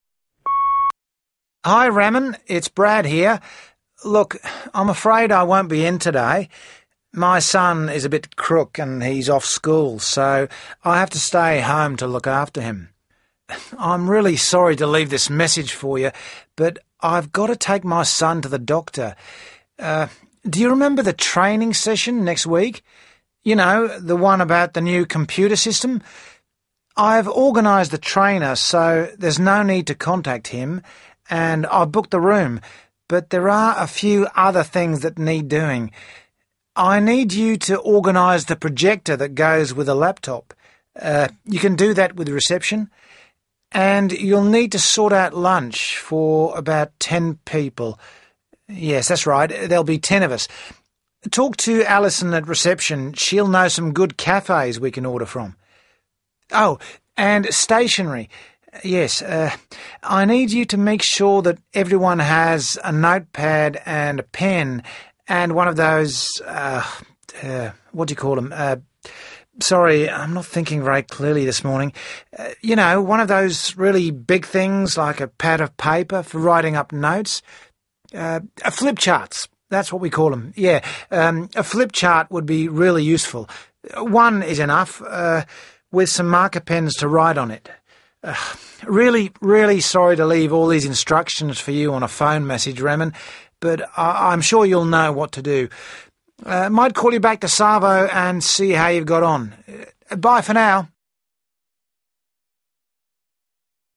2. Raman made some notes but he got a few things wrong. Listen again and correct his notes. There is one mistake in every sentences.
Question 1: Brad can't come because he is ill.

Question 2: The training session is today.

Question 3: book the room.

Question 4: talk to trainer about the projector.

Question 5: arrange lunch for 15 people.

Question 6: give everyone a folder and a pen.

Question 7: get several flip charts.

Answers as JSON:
{"1": "he his son", "2": "today next week", "3": "book the room. The room is already booked.", "4": "trainer reception", "5": "15 10", "6": "folder notepad", "7": "several flip charts a flip chart"}